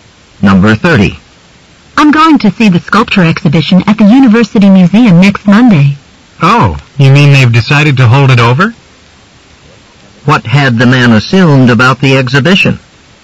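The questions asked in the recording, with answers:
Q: What had the man assumed about the exhibition?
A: That it had already ended.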